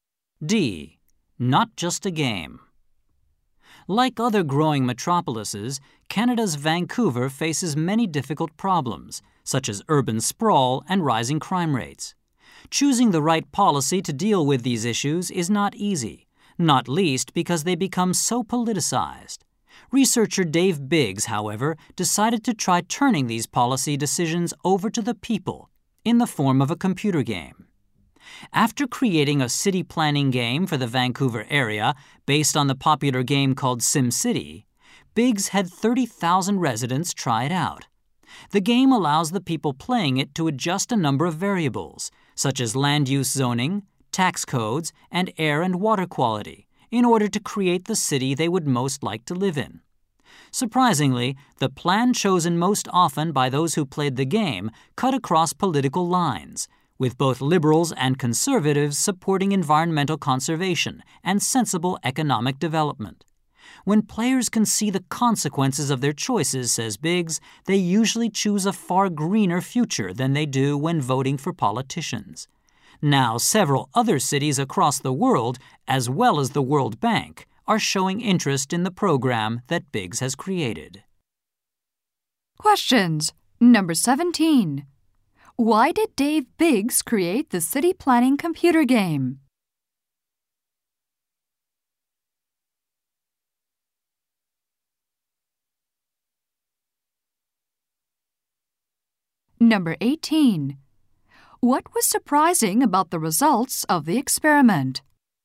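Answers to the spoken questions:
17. To let the people make policy decisions on city problems
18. The most popular plan cut across political lines, with both liberals and conservatives favoring conservation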